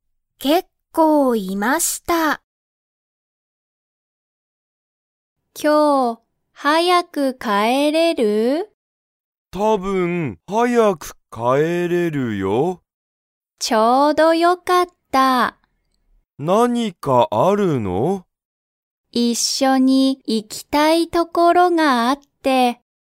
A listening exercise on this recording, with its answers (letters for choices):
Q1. カオリは、____行(い)きたい所(ところ)がある。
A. 一緒(いっしょ)に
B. 一人(ひとり)で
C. この前(まえ)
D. 結構(けっこう)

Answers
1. A

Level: Level 1